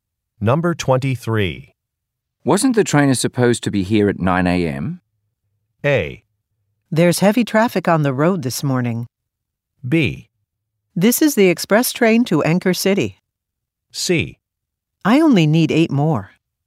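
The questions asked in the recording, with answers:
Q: Wasn't the trainer supposed to be here at 9 a.m.?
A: A: There's heavy traffic on the road this morning.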